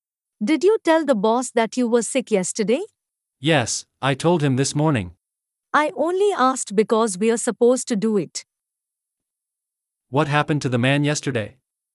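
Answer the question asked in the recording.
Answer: He was sick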